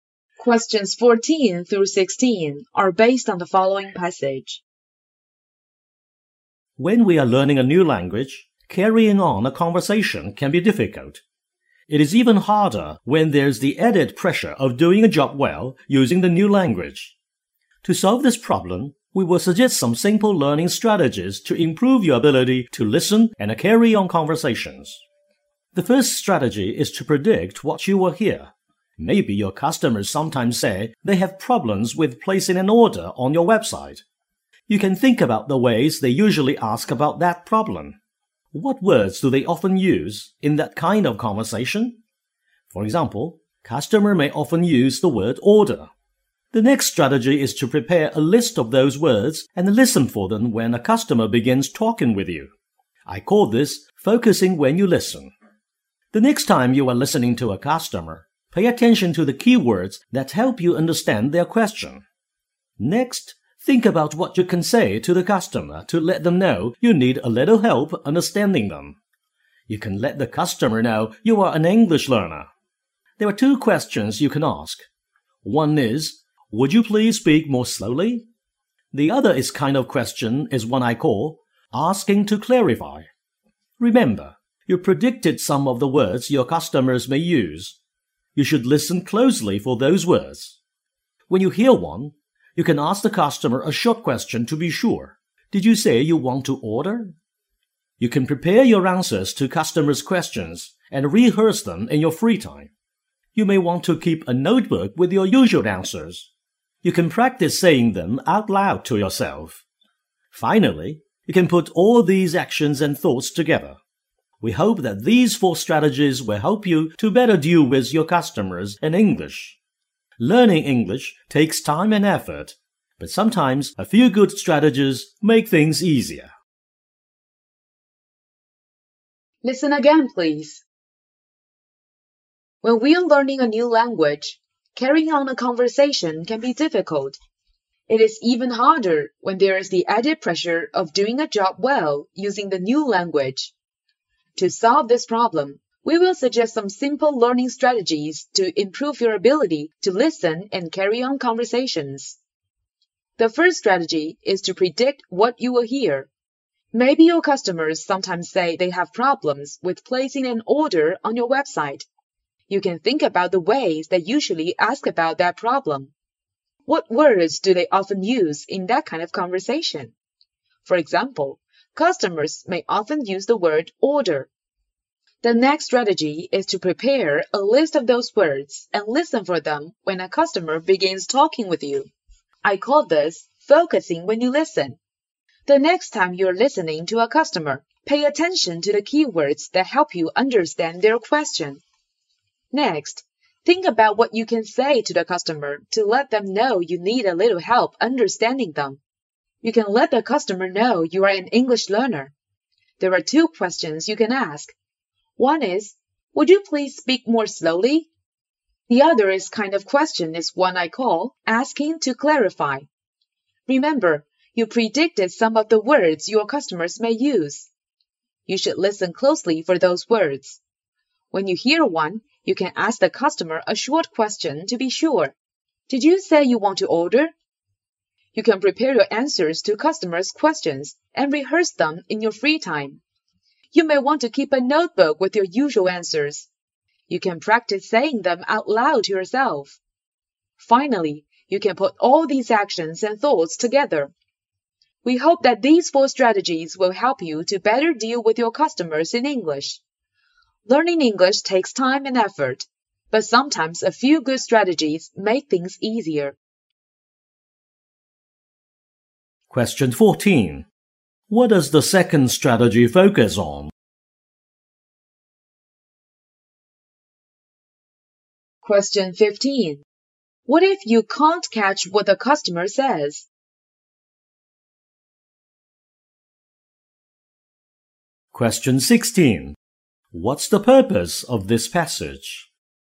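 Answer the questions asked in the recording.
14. Listening for key words
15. Ask them to speak more slowly or ask to clarify
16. To suggest strategies for handling customers in a new language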